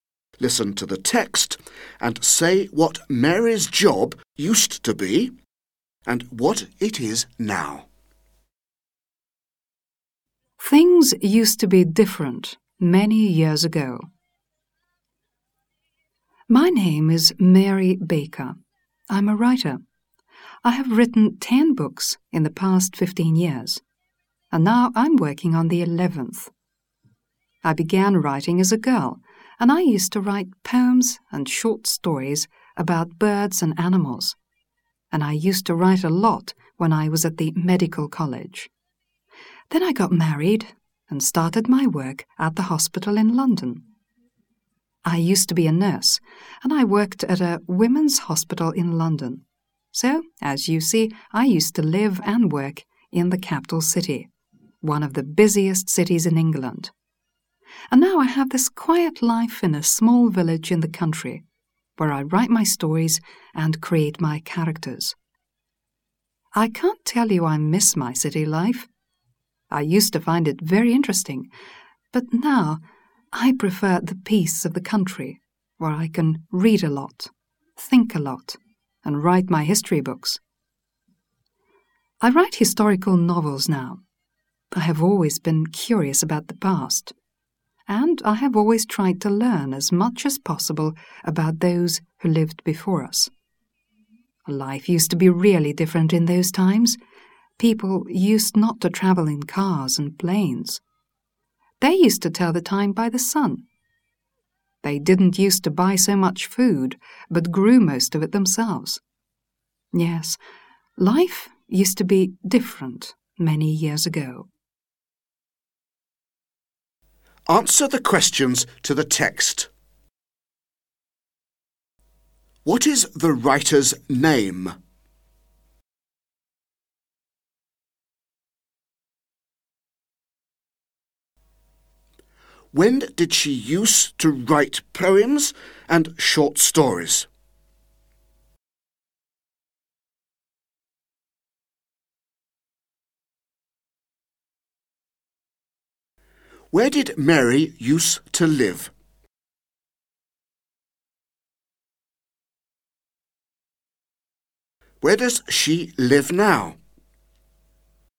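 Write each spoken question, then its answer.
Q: What is the writer's name?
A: Mary Baker

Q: When did she use to write poems and short stories?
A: As a girl and when she was at the medical college

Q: Where did Mary use to live?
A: In London, the capital city

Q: Where does she live now?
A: In a small village in the country

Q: Why does Mary say that life used to be different many years ago?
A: People didn't travel in cars and planes, told the time by the sun, and grew most of their food themselves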